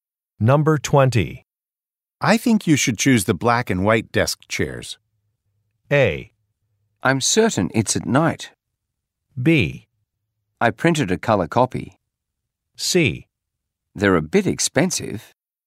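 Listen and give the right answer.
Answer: C: They're a bit expensive.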